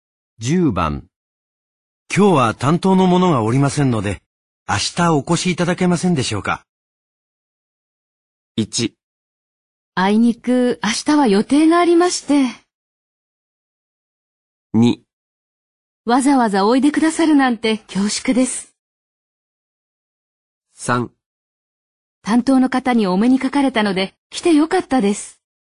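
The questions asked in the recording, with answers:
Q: 今日は担当の者がおりませんので、明日お越しいただけませんでしょうか。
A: 1: あいにく明日は予定がありまして。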